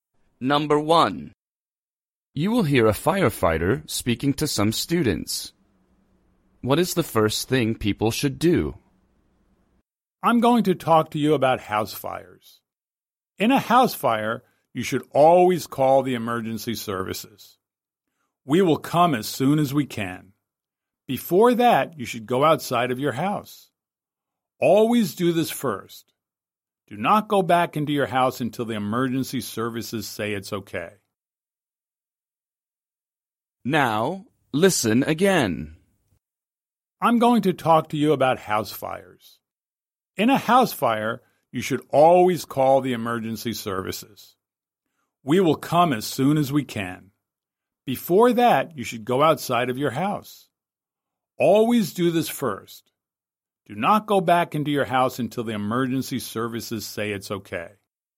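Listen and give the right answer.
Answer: Go outside of the house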